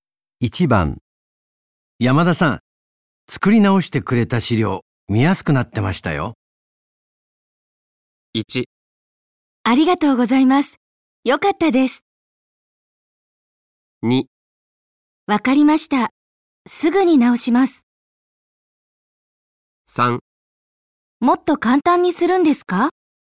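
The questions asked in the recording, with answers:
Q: 山田さん、作り直してくれた資料、見やすくなってましたよ。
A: 1: ありがとうございます。よかったです。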